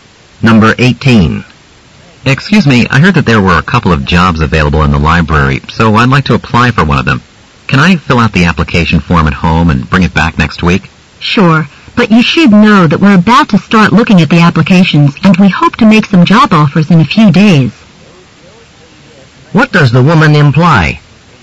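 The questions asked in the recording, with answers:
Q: What does the woman imply?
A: The man should return the application soon.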